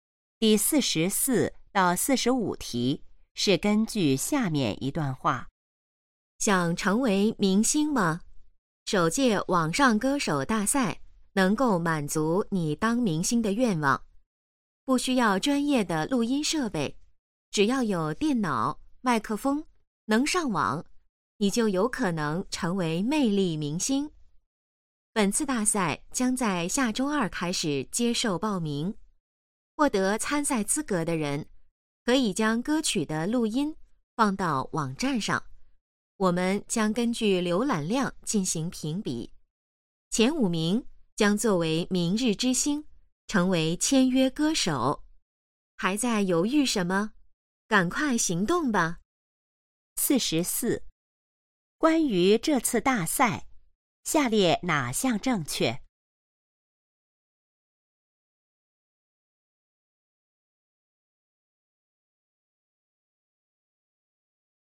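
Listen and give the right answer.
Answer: 浏览量前五名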